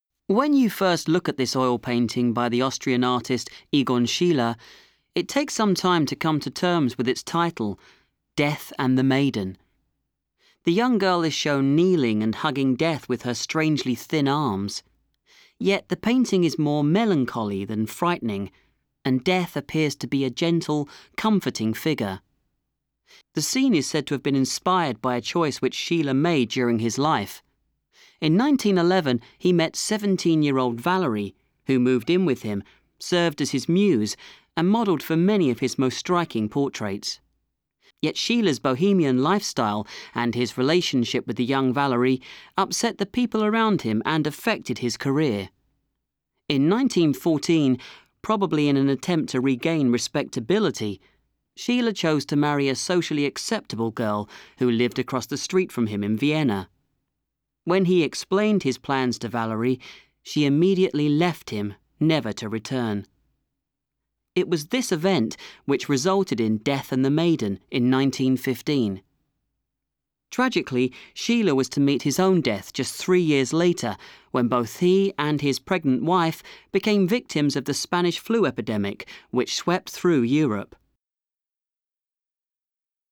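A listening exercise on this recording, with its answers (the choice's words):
Kuuntele teksti täältä ja vastaa alla oleviin kysymyksiin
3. 'Death and the Maiden' depicts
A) sadness and lost love.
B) tragic death.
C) fear of death.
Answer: sadness and lost love.

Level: Course 3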